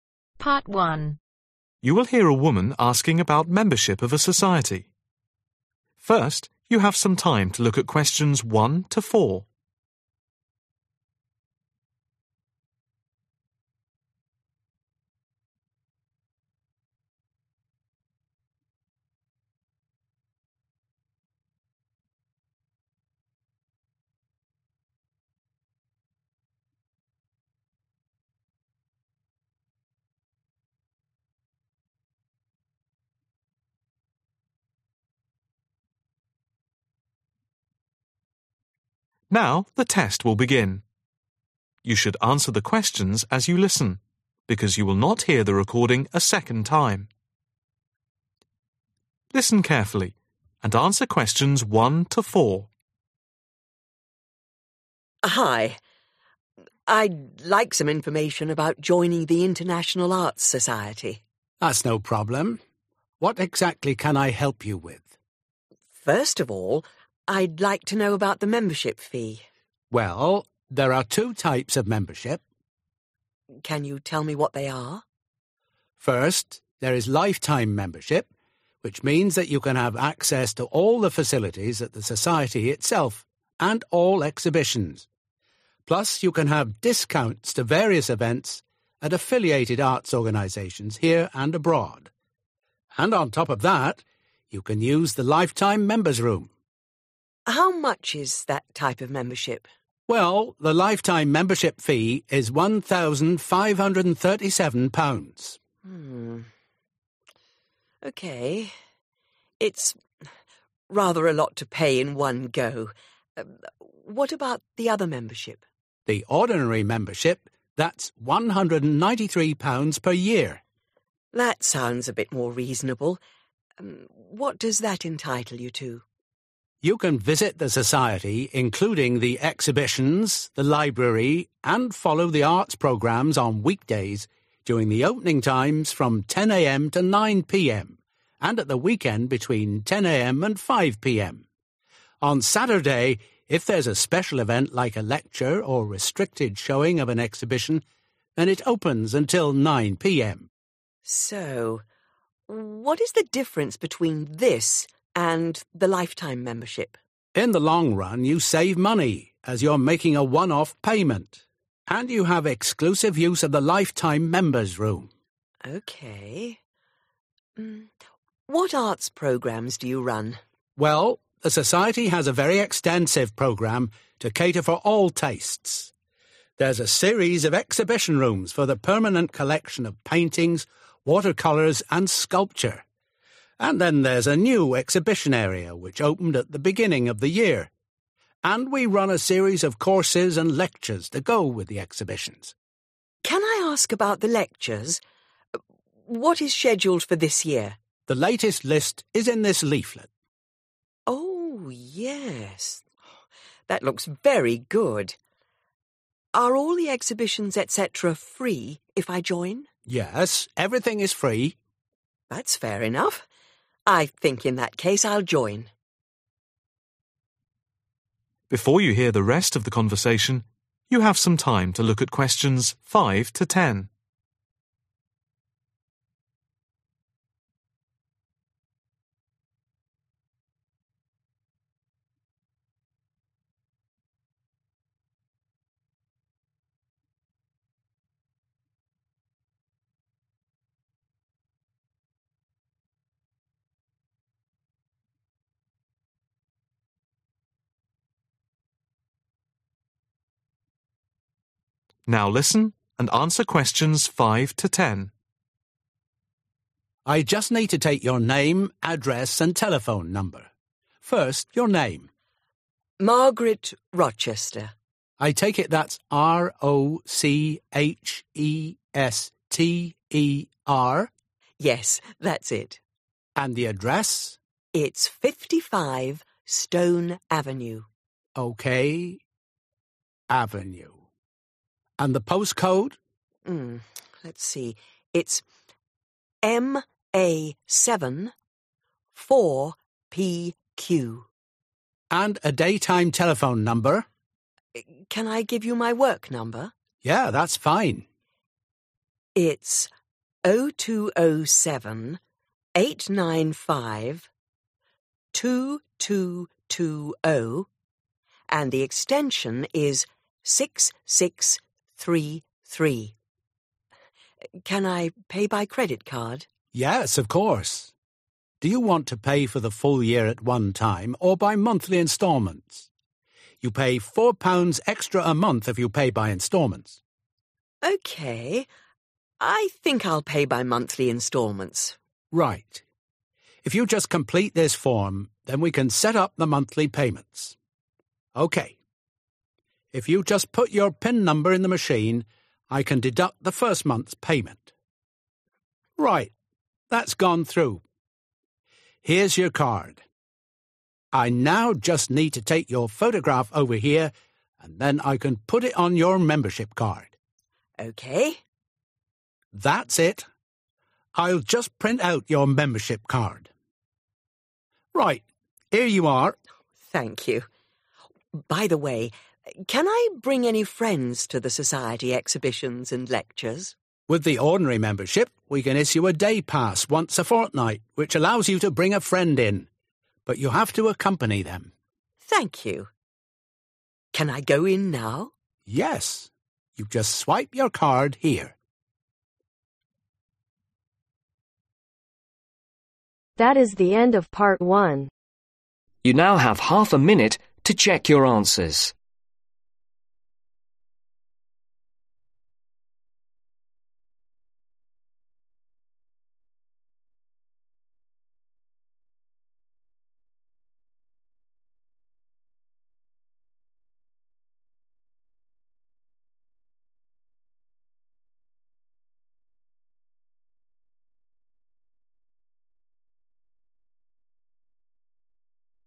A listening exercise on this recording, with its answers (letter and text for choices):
Choose the correct letter A , B or C.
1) How much is the life-time membership of the society ?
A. £1, 535.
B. £1, 935.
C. £1, 537.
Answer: C. £1, 537.

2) How much does the ordinary membership cost per year ?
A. £ 293.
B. £ 396.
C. £ 193.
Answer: C. £ 193.

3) What are the opening times on week-days ?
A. 9 am to 10 pm.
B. 10 am to 9 pm.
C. 10 am to 5 pm.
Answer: B. 10 am to 9 pm.

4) What is the arts program at the Society like ?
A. limited.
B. wide.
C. interesting.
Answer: B. wide.

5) Name Margaret (5) ............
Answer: Rochester

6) Address 55 stone (6) ............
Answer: Avenue

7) Postcode (7) ............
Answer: MA74PQ

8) Work number 0207 895 2220 Extension (8) ............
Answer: 6633

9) Payment terms by monthly (9) ............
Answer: installments

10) Guest restrictions one per (10) ............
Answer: fortnight